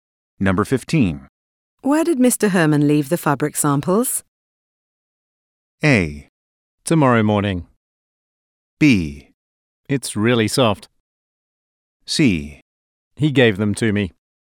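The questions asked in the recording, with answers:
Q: Where did Mr. Herman leave the fabric samples?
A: C: He gave them to me.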